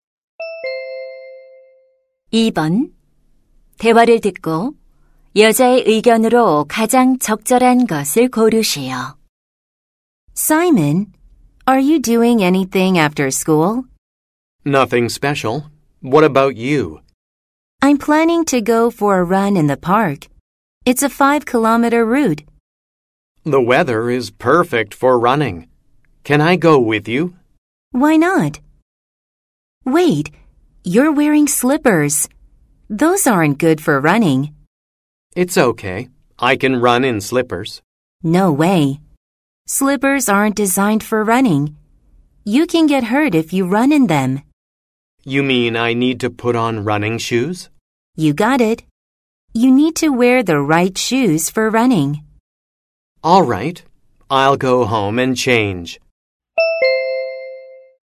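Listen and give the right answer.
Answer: 달릴 때는 알맞은 운동화를 신어야 한다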